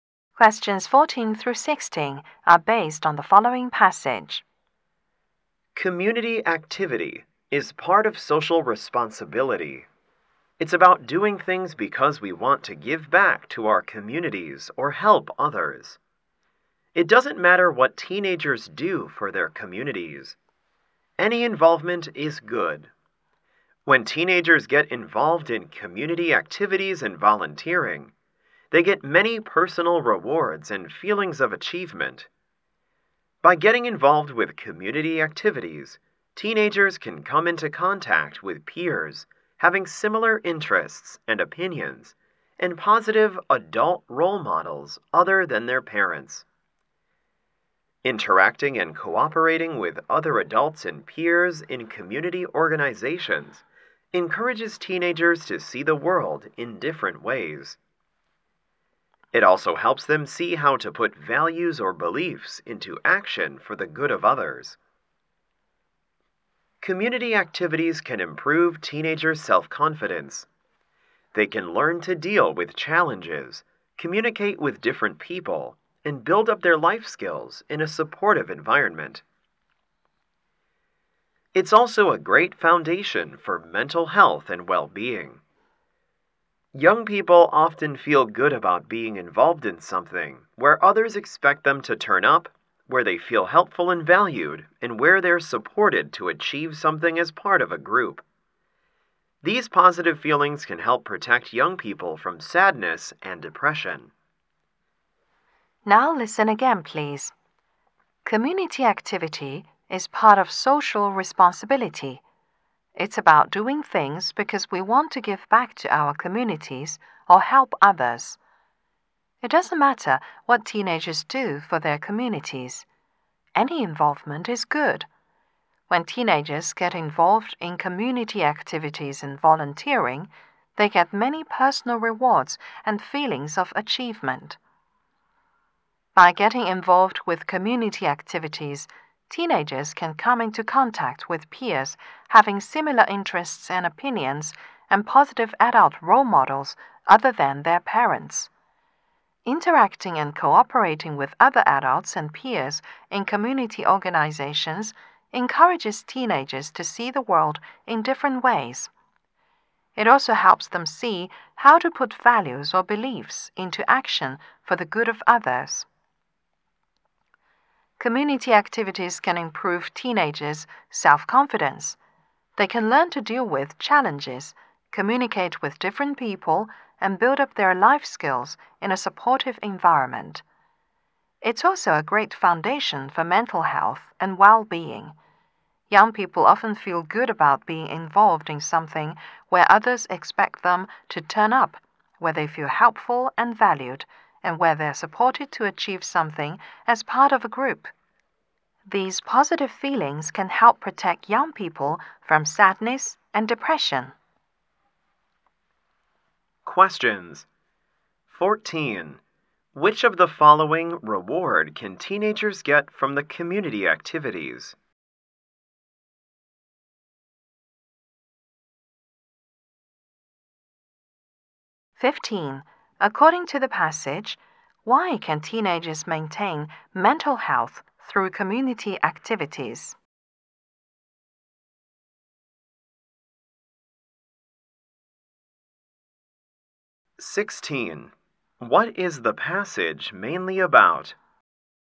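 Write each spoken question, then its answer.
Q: According to the passage, why can teenagers maintain mental health through community activities?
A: Because they feel helpful and valued, and these positive feelings protect them from sadness and depression

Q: What is the passage mainly about?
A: The benefits of community activities for teenagers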